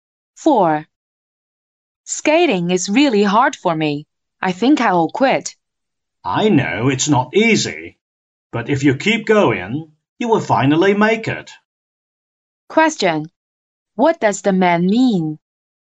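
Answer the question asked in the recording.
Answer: The woman should keep trying skating and not quit.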